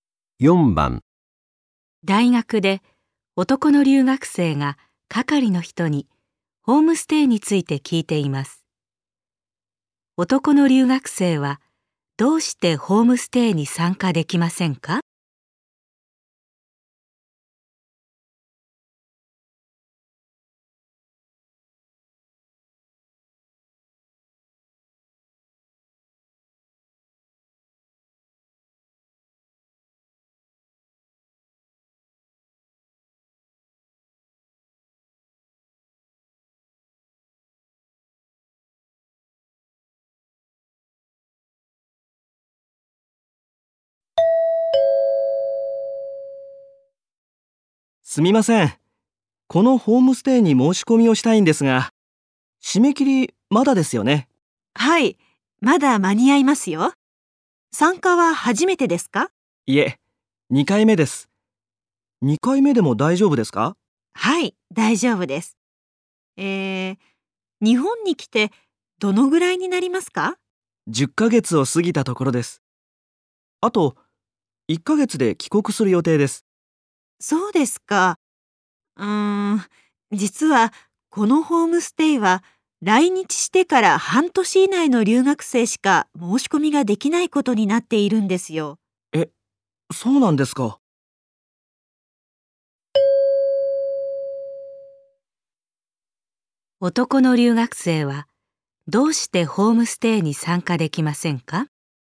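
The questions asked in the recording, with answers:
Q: 男の留学生はどうしてホームステイに参加できませんか?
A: 来日してから半年以上たっているから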